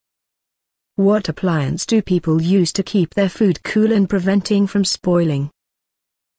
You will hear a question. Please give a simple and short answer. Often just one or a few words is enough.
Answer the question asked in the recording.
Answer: Fridge